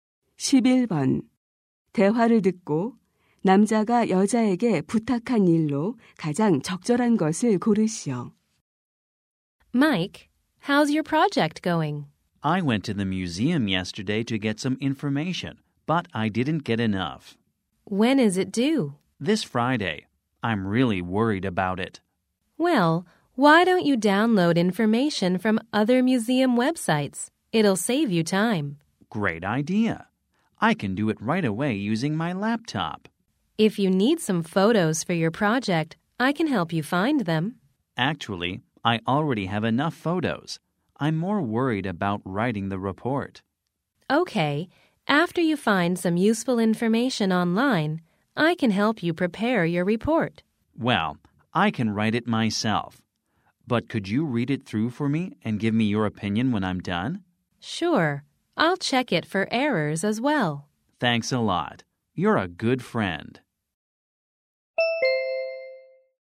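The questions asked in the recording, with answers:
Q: 대화를 듣고 남자가 여자에게 부탁한 일로 가장 적절한 것을 고르시오.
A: 보고서를 읽고 의견 주기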